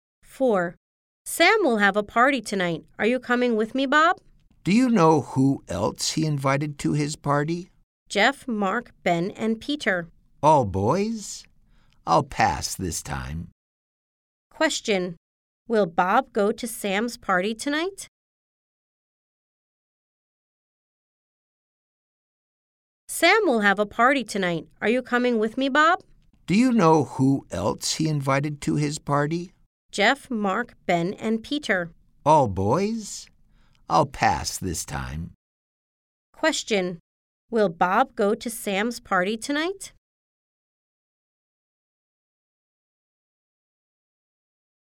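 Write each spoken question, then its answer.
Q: Will Bob go to Sam's party tonight?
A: No, he won't.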